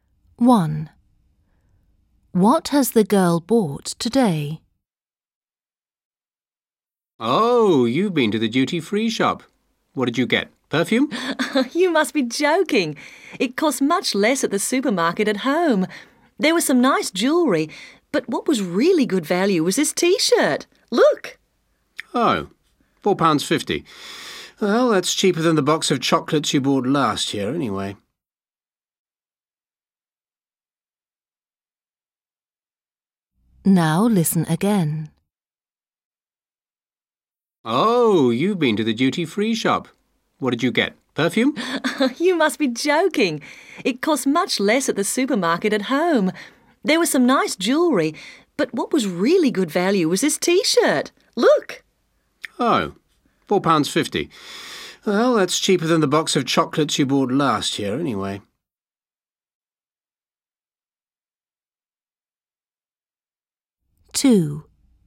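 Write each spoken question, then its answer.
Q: What has the girl bought today?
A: a T-shirt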